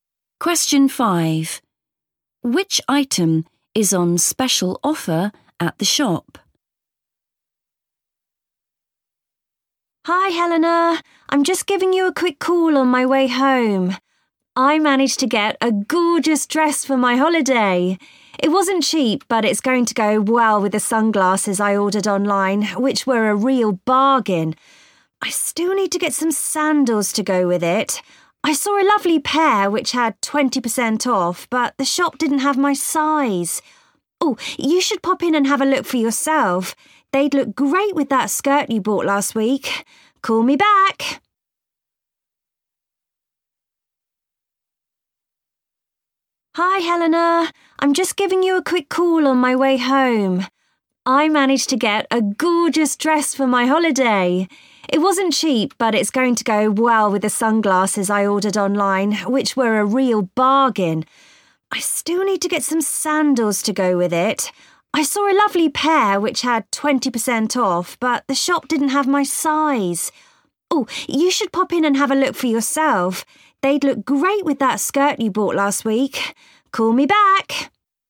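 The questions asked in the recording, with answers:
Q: Which item is on special offer at the shop?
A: Sandals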